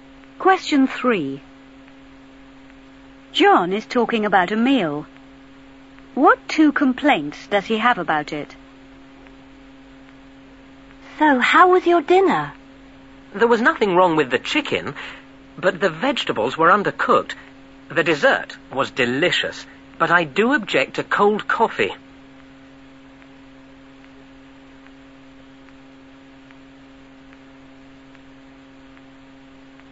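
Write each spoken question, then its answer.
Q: What 2 complaints does he have about it?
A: The vegetables were undercooked and the coffee was cold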